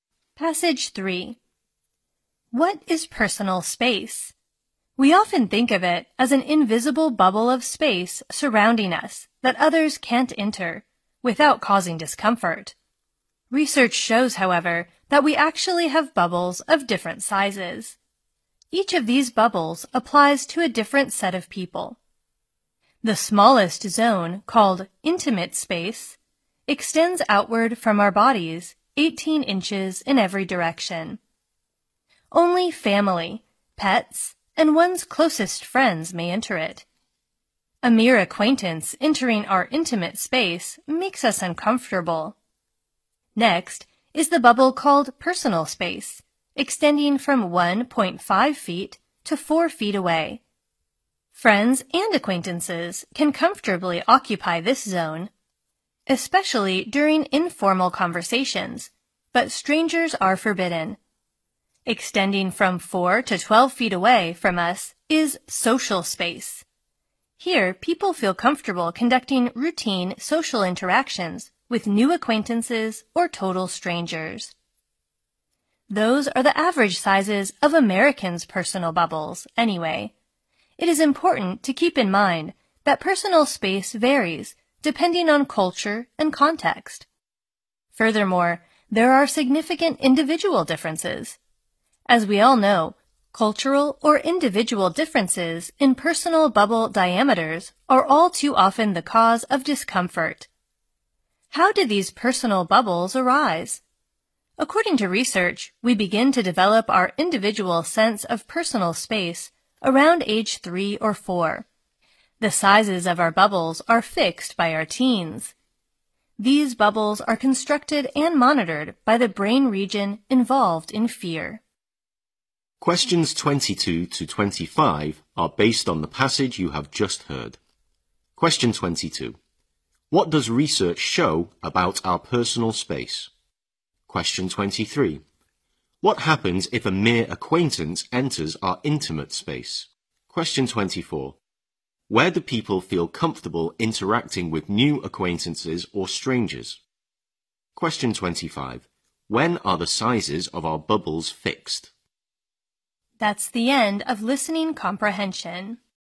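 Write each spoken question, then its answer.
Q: What does research show about our personal space?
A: We have bubbles of different sizes for different sets of people

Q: What happens if a mere acquaintance enters our intimate space?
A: We feel uncomfortable

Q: Where do people feel comfortable interacting with new acquaintances or strangers?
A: In social space, 4 to 12 feet away

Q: When are the sizes of our bubbles fixed?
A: By our teens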